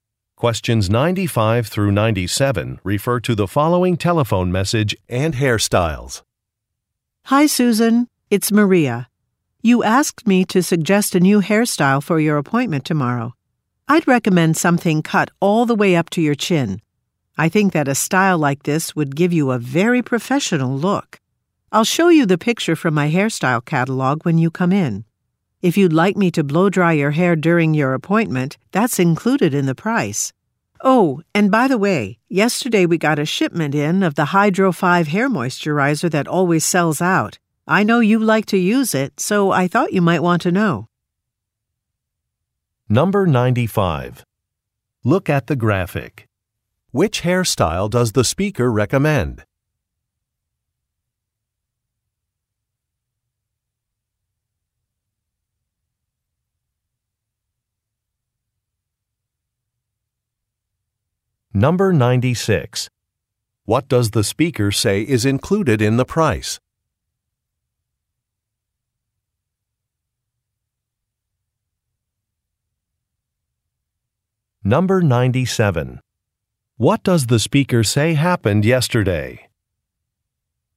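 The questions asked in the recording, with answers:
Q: What does the speaker say is included in the price?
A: Blow-drying hair

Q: What does the speaker say happened yesterday?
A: A shipment of Hydro 5 hair moisturizer arrived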